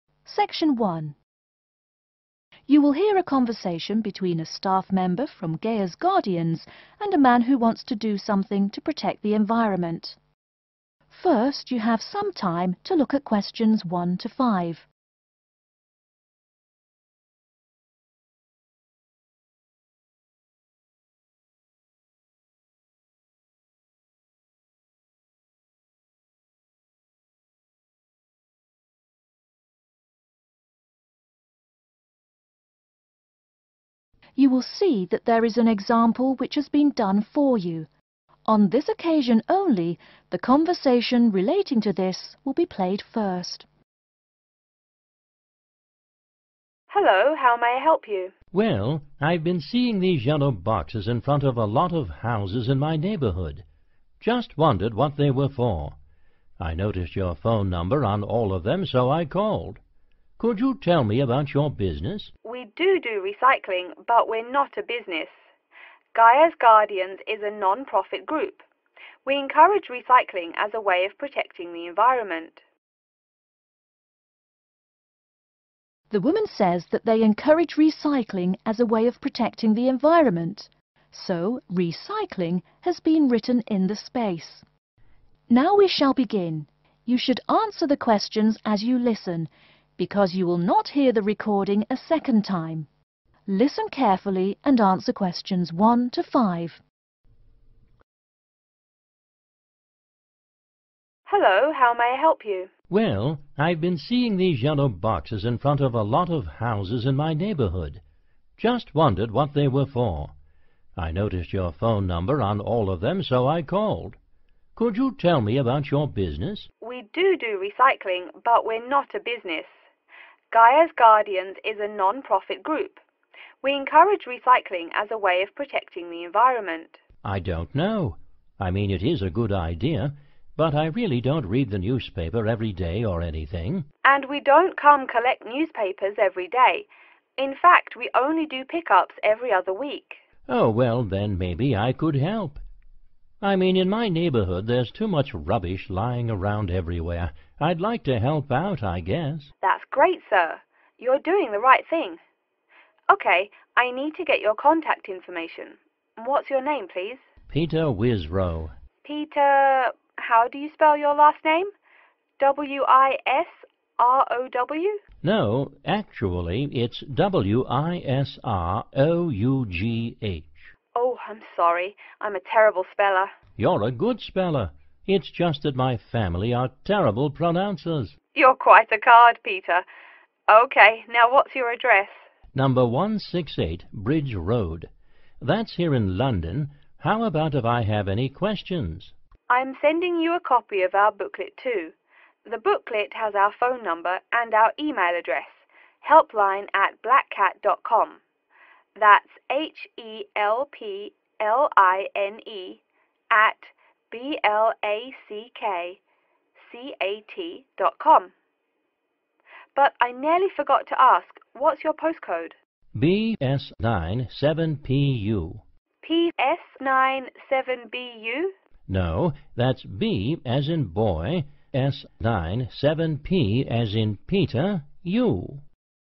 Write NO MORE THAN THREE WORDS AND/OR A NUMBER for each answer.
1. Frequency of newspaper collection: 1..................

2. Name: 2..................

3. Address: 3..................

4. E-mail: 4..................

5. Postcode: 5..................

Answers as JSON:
{"1": "every other week", "2": "Peter Wisrough", "3": "168 Bridge Road", "4": "helpline@blackcat.com", "5": "BS97PU"}